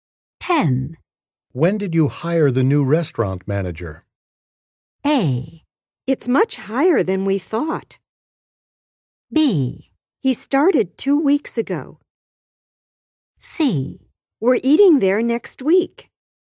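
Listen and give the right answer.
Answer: B: He started 2 weeks ago.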